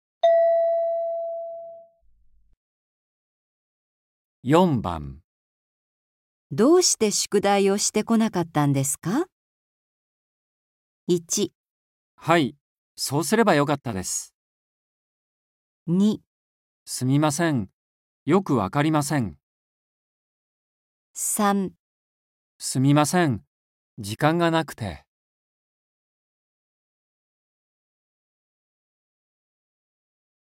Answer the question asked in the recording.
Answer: 3

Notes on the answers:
F: どうして 宿題を して こなかったんですか。 M: 1. はい、そうすれば よかったです。 2. すみません、よく わかりません。 3. すみません、時間がなくて。

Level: N4